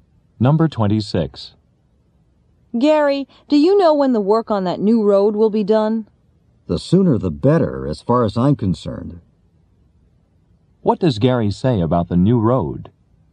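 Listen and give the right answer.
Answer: He wants it finished as soon as possible.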